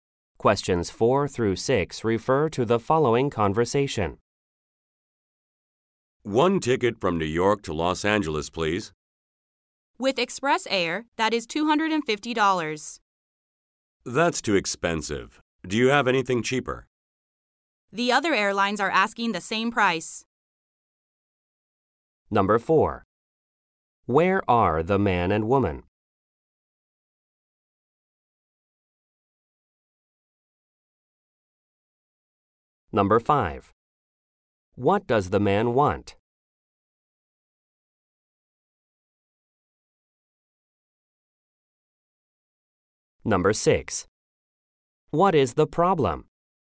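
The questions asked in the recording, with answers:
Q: What does the man want?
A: A cheaper ticket to Los Angeles

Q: What is the problem?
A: The ticket is too expensive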